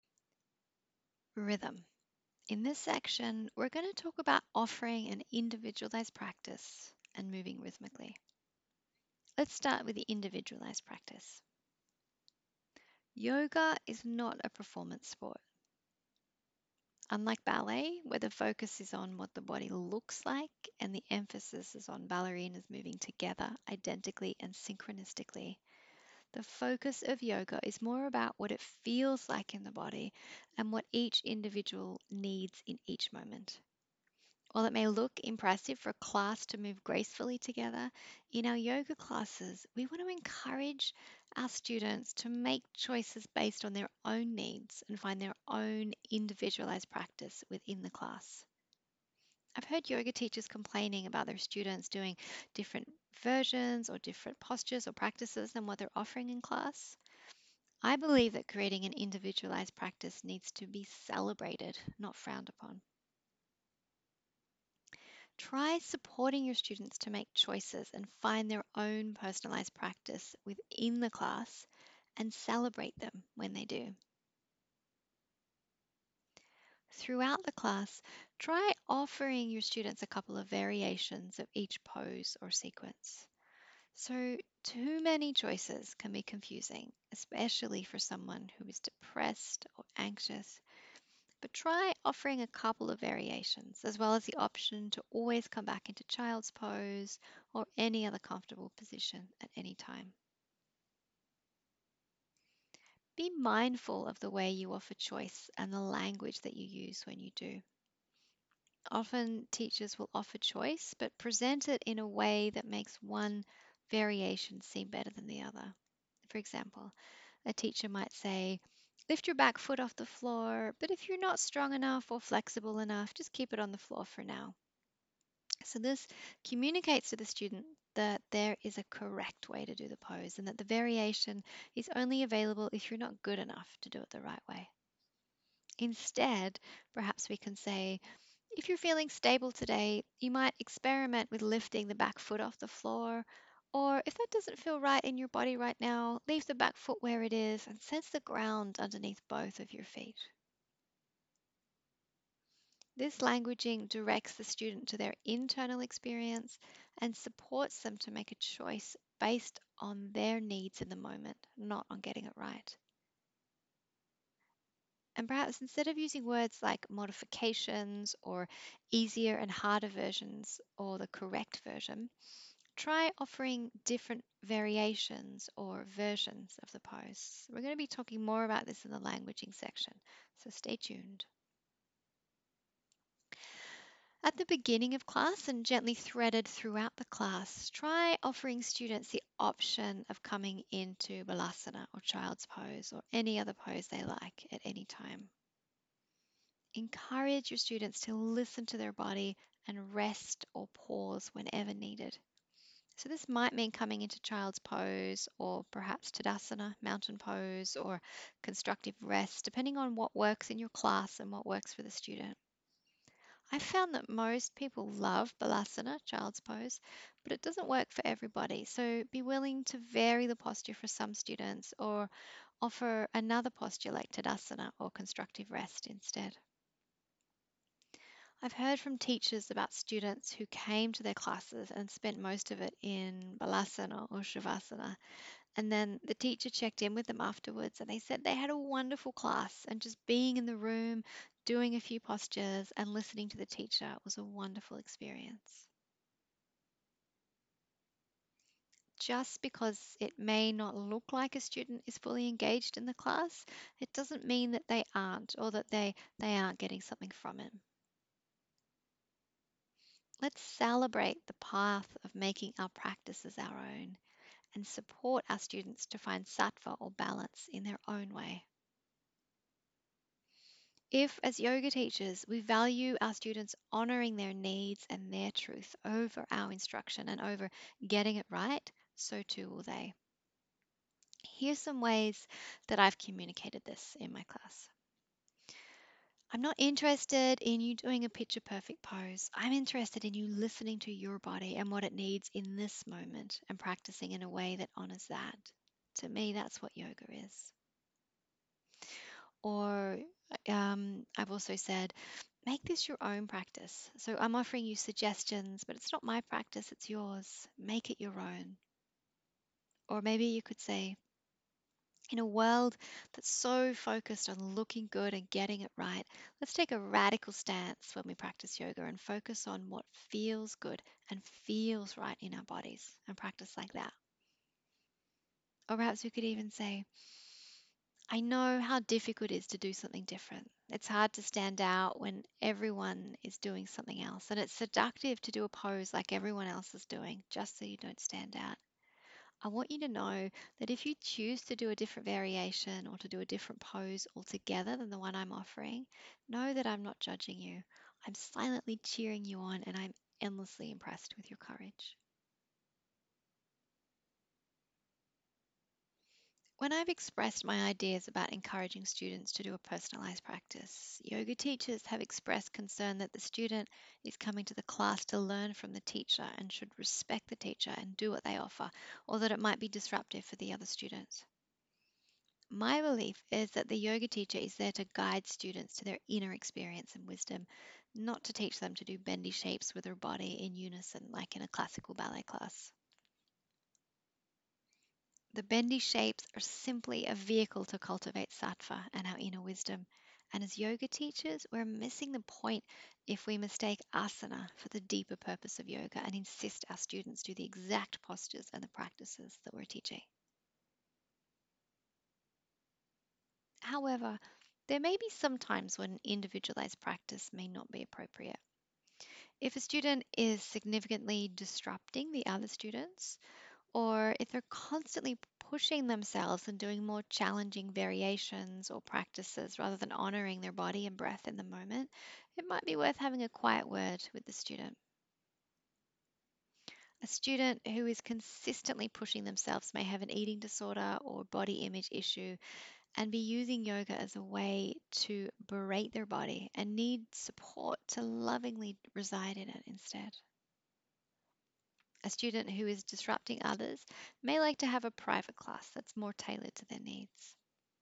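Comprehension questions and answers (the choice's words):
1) Supporting students to develop an individualised practice in a group class is:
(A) Impossible.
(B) Too distracting for the other students.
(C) Too hard for the teacher.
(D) A kind and thoughtful way to support students to make choices based on their own needs.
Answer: A kind and thoughtful way to support students to make choices based on their own needs.

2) How can teachers support their students to create an individualised practice in their class?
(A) Offer variations of practices.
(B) Use language that directs the students to their internal experience, and supports them to make choices based on their needs in the moment.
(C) Offer the option of child's pose or another comfortable pose at any time.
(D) All of the above.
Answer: All of the above.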